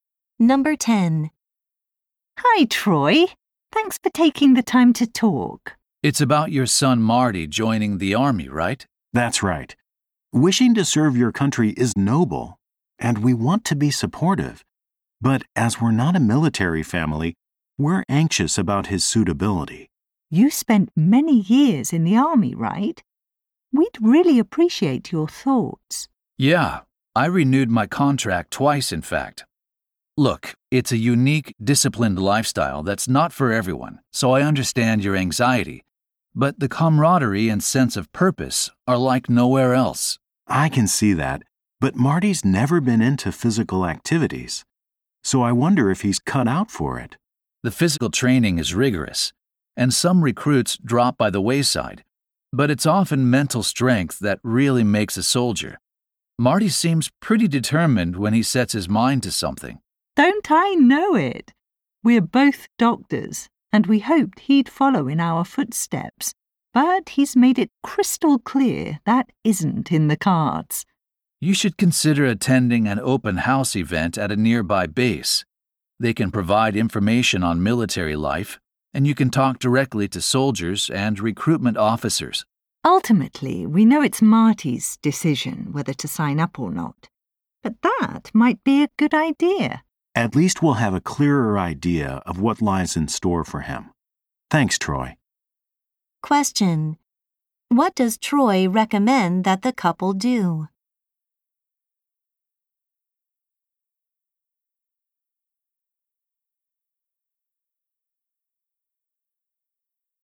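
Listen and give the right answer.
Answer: Go to an open house event at a nearby base.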